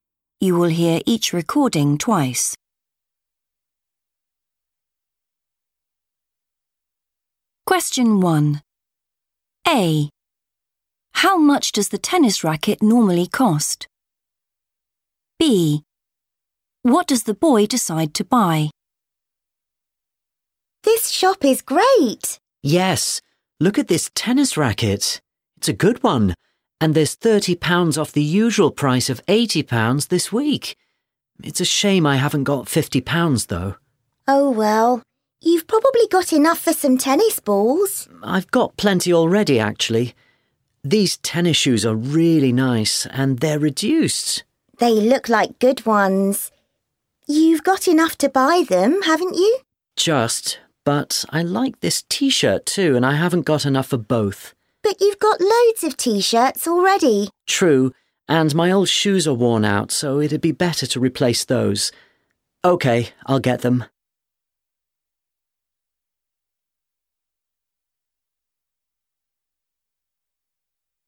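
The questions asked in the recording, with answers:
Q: How much does the tennis racket normally cost?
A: £80

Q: What does the boy decide to buy?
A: tennis shoes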